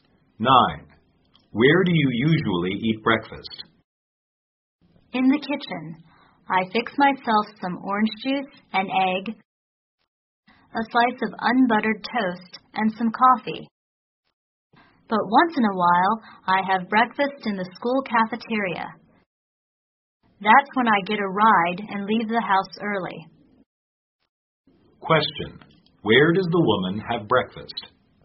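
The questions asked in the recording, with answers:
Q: Where does the woman have breakfast?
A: Usually in her kitchen, sometimes in the school cafeteria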